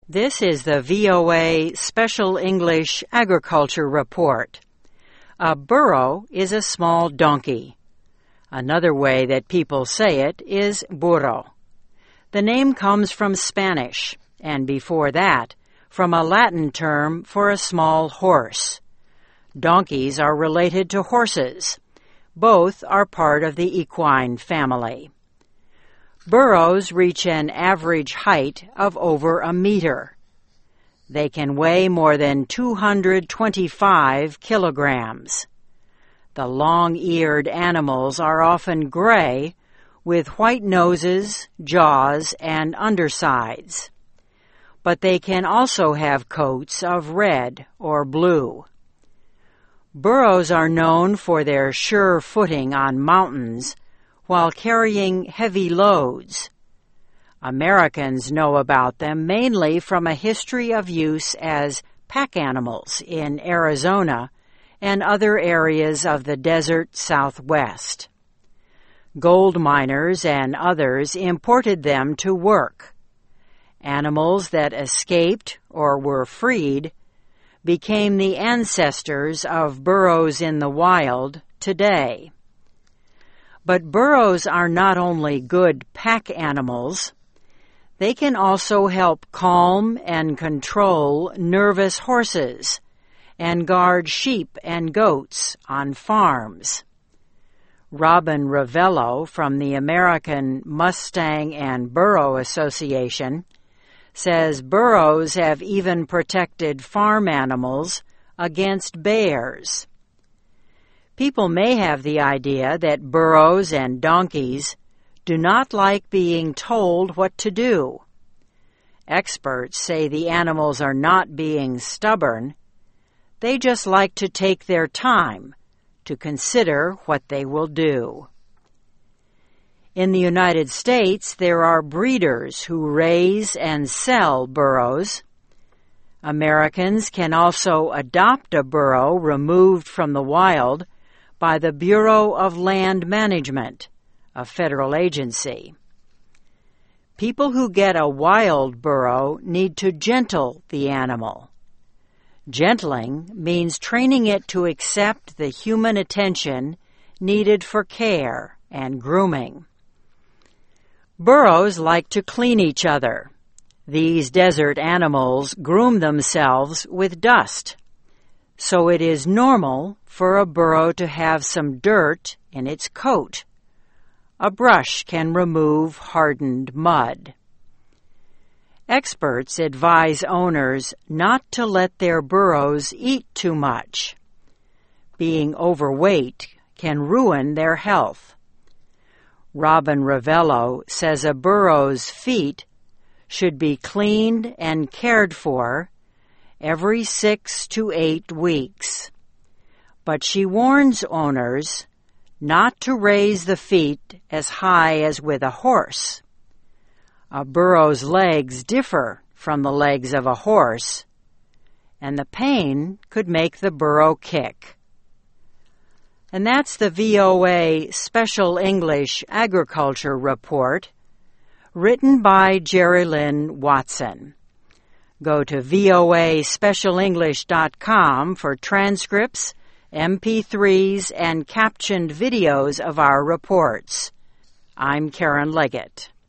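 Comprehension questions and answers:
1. Burros reach an average of over a meter.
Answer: height

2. The long-eared animals are often with white noses, jaws and .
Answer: gray; undersides

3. They can also help calm and control nervous horses and guard sheep and on farms.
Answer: goats

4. Robin Rivello from the American Mustang and Burro Association says burros have even protected farm animals against .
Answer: bears

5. Being can ruin their health.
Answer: overweight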